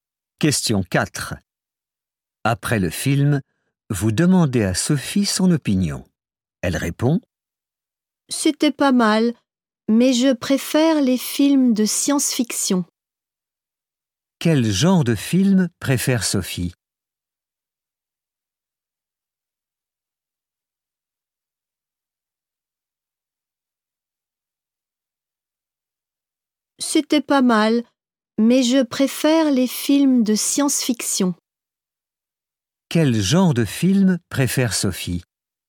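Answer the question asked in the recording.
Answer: Les films de science-fiction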